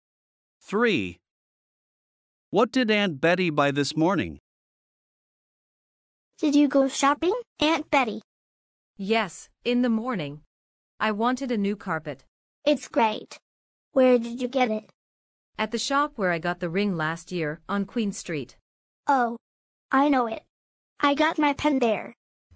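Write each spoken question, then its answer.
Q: What did Aunt Betty buy this morning?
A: A carpet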